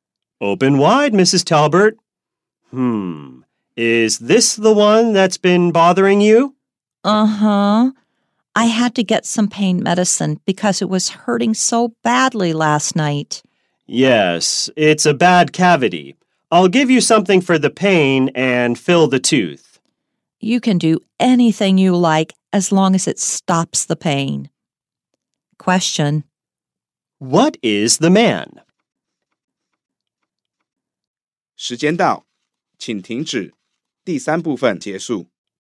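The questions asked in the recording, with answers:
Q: What is the man?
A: A dentist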